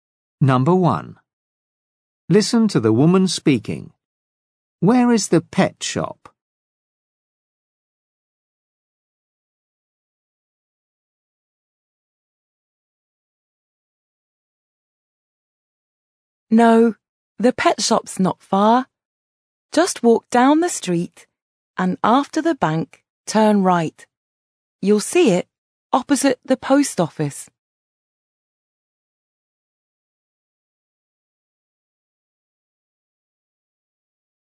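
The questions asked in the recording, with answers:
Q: Where is the pet shop?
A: Opposite the post office, on the right after the bank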